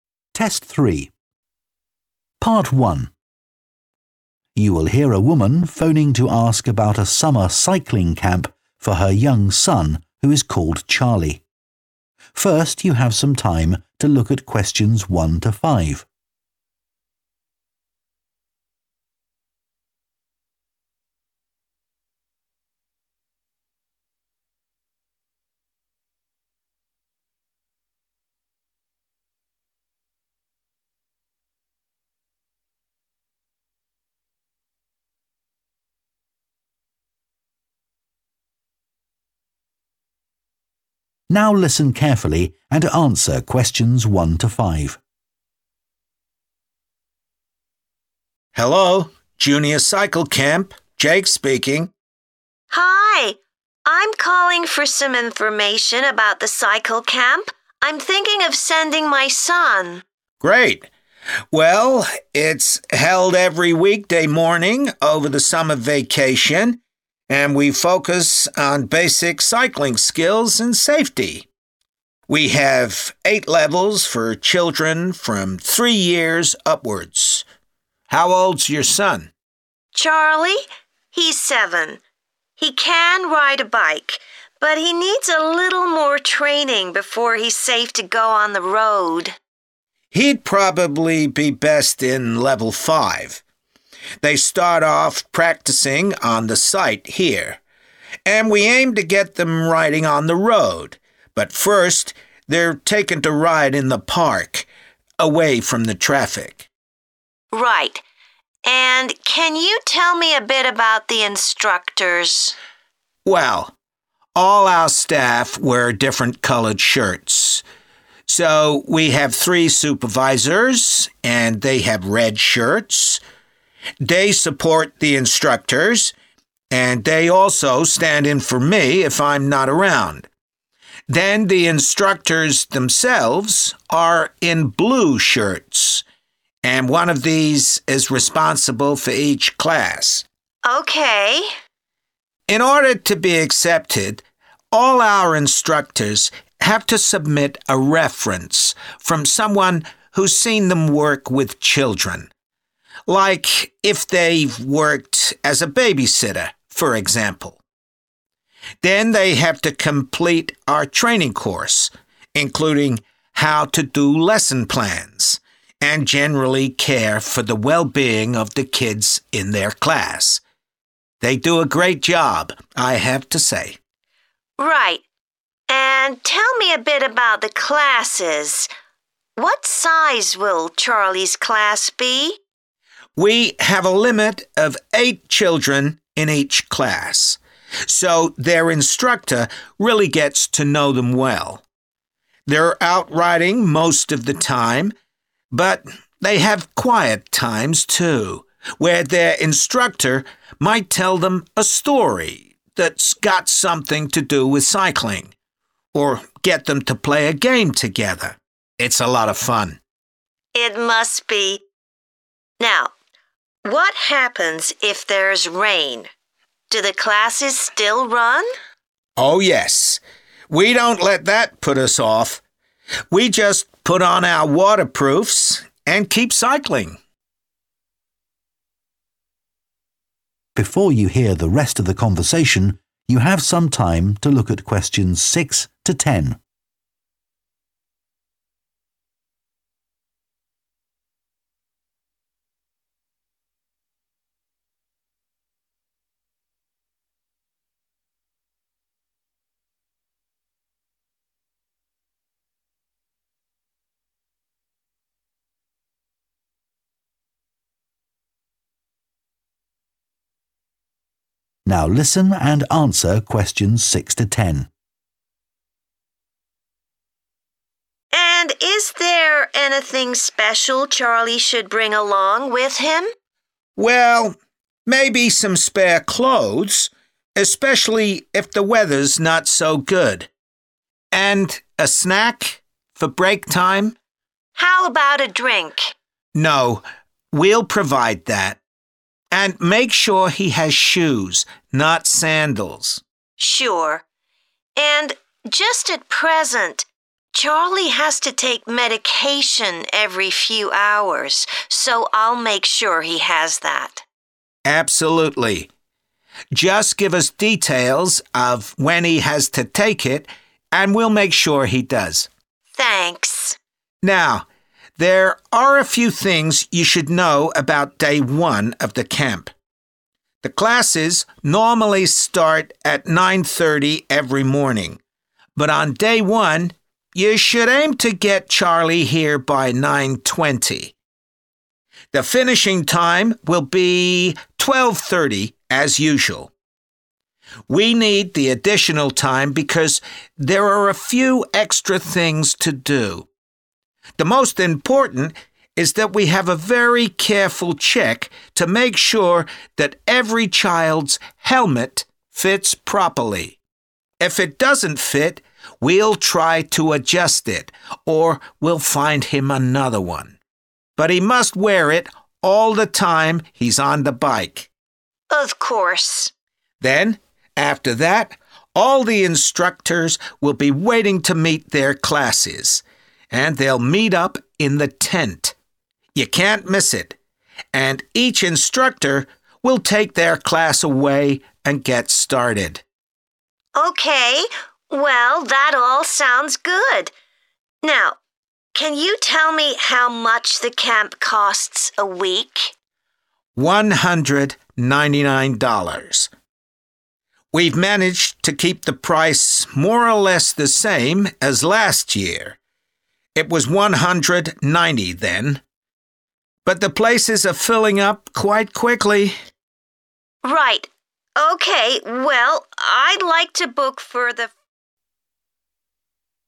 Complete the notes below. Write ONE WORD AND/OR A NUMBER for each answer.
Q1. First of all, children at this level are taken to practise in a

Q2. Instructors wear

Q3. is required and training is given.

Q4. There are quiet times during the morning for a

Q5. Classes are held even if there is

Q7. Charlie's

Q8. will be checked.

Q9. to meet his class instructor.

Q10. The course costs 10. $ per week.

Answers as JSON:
{"1": "park", "2": "blue", "3": "reference", "4": "story", "5": "rain", "7": "medication", "8": "helmet", "9": "tent", "10": "199"}